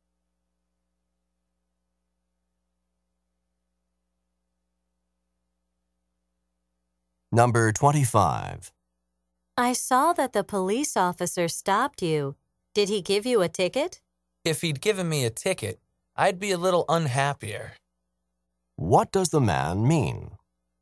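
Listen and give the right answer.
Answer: He didn't get a ticket.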